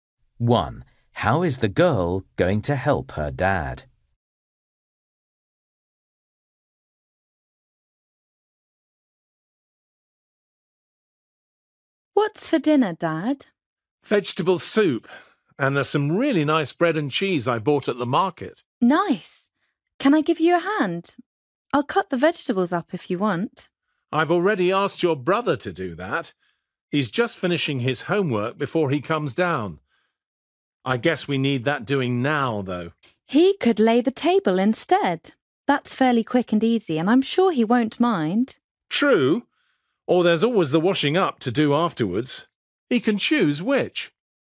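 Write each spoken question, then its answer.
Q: How is the girl going to help her dad?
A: By cutting up the vegetables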